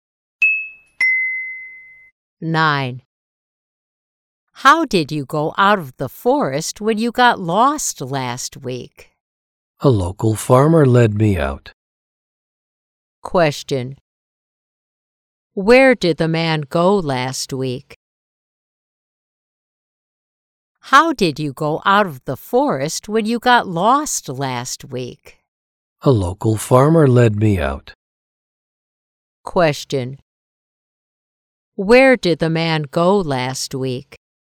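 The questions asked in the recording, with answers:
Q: Where did the man go last week?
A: To the forest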